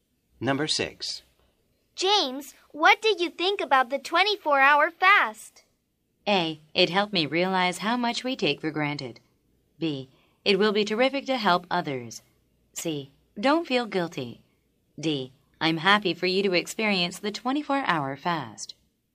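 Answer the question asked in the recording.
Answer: A: It helped me realize how much we take for granted.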